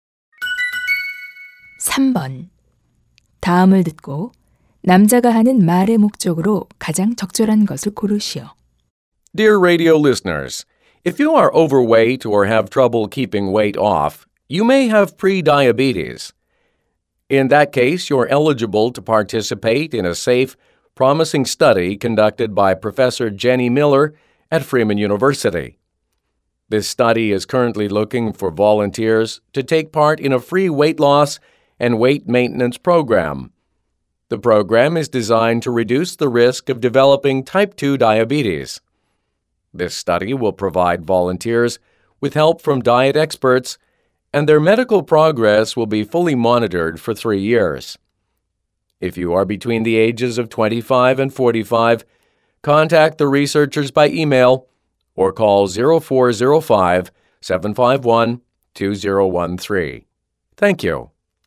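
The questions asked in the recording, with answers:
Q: 다음을 듣고 남자가 하는 말의 목적으로 가장 적절한 것을 고르시오.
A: 체중 감량 연구에 참여할 자원봉사자를 모집하려고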